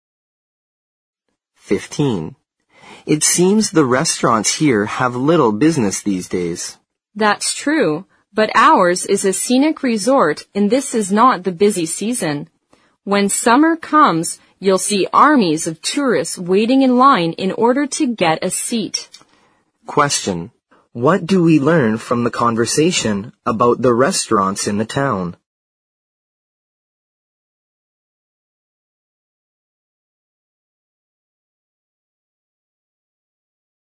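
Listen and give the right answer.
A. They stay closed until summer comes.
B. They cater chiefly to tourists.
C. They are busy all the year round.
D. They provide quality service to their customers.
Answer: B. They cater chiefly to tourists.

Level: 四级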